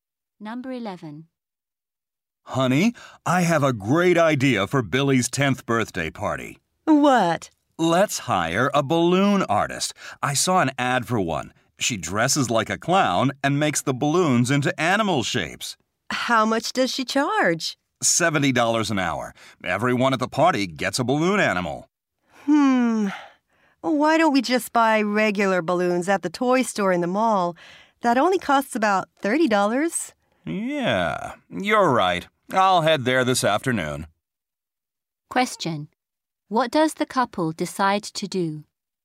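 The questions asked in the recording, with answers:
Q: What does the couple decide to do?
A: Buy regular balloons at the toy store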